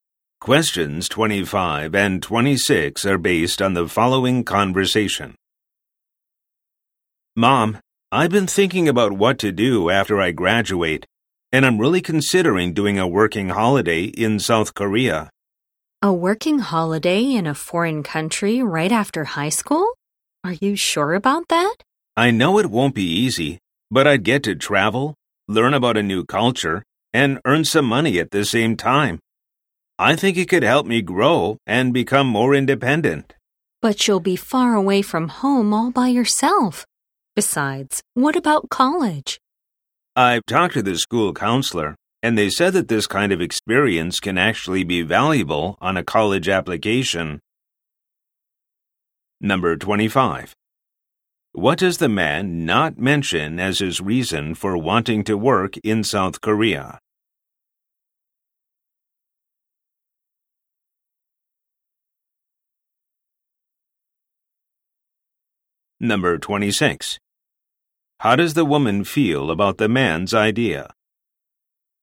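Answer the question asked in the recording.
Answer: Worried and doubtful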